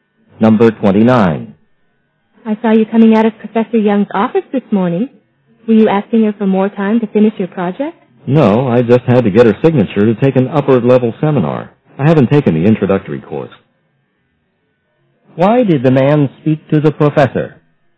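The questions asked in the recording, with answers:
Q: Why did the man speak to the professor?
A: To get her signature to take an upper-level seminar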